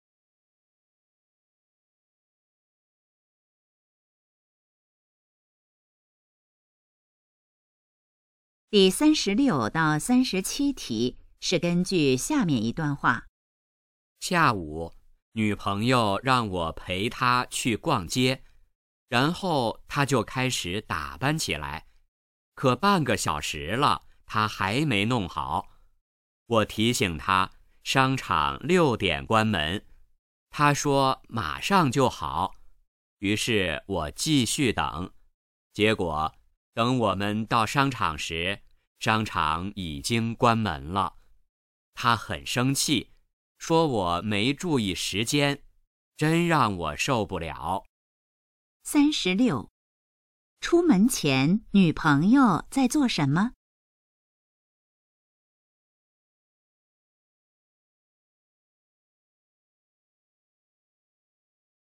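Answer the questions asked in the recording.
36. 打扮
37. 到商场时商场已经关门了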